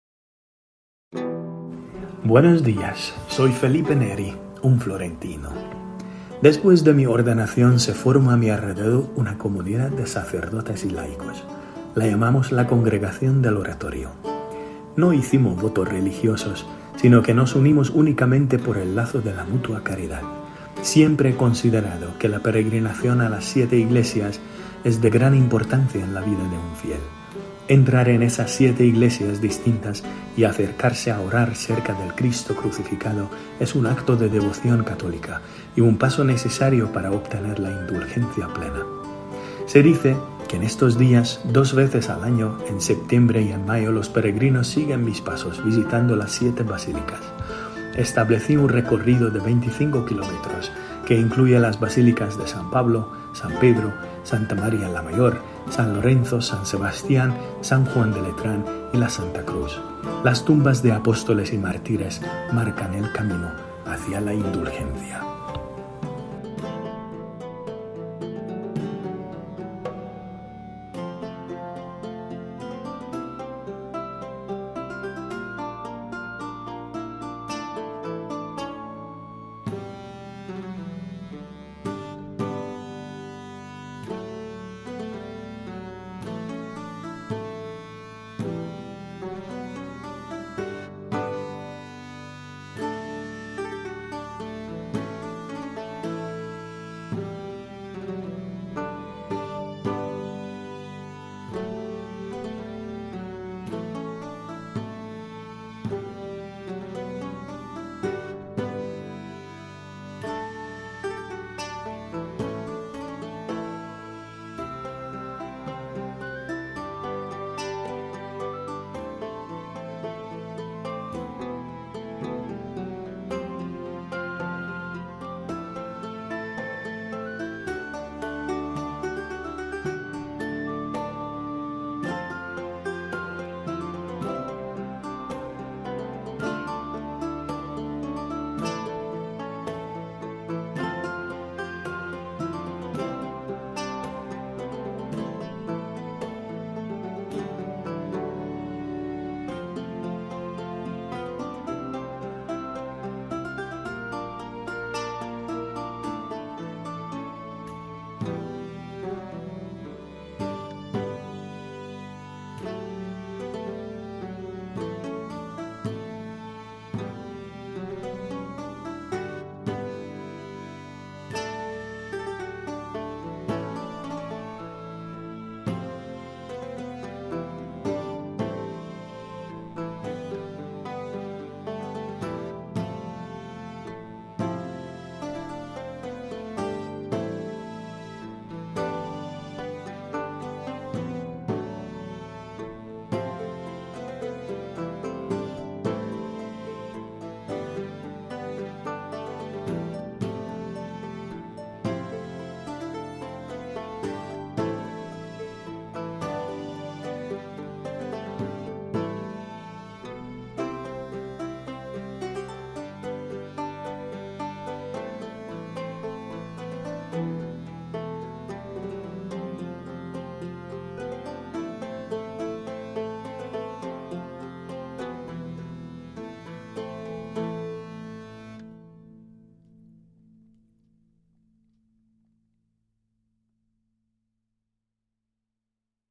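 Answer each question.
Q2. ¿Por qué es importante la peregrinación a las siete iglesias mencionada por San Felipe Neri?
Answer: Es un acto de devoción católica y un paso necesario para obtener la indulgencia plena.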